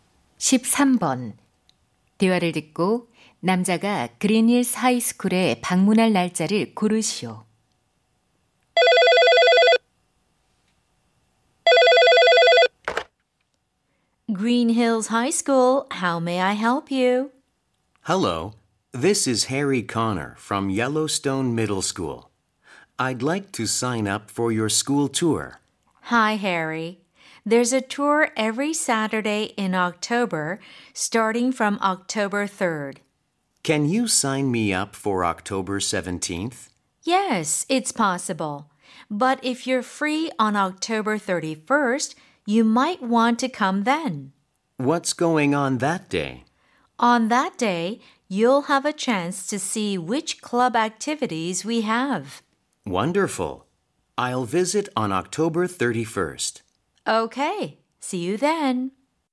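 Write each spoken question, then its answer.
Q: 대화를 듣고 남자가 그린힐스 하이스쿨에 방문할 날짜를 고르시오.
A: 10월 31일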